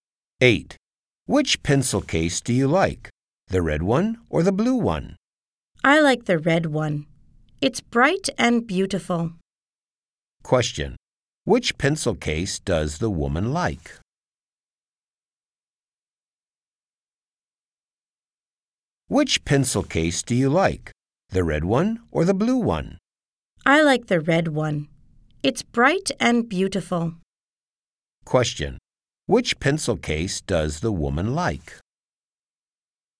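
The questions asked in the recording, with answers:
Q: Which pencil case does the woman like?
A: The red one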